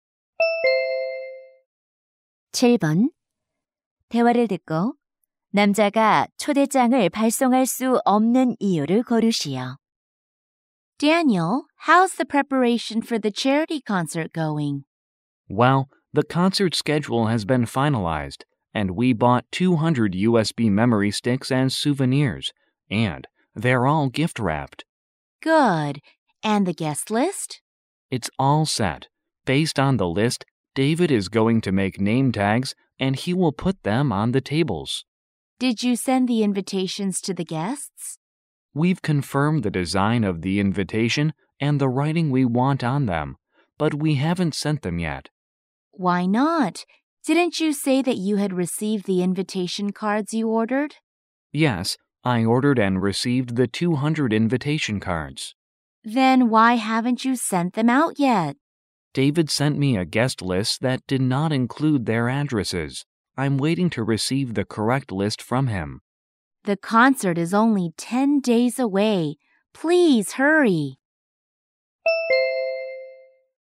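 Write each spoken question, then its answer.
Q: 대화를 듣고 남자가 초대장을 발송할 수 없는 이유를 고르시오.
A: 받은 손님 명단에 주소가 없어서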